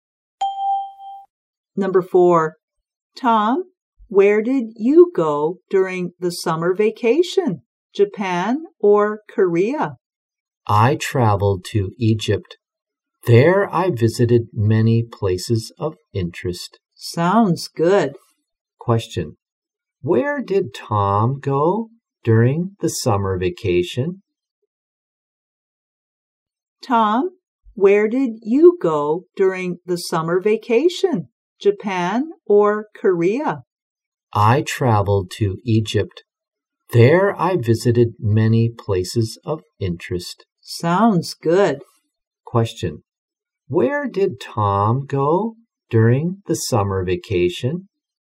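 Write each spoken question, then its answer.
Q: Where did Tom go during the summer vacation?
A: Egypt.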